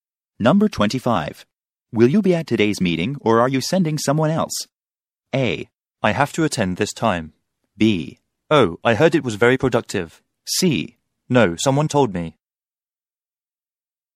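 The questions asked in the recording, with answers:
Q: Will you be at today's meeting or are you sending someone else?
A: A: I have to attend this time.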